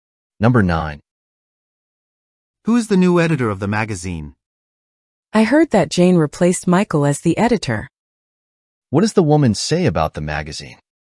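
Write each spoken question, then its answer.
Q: What does the woman say about the magazine?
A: Jane has replaced Michael as editor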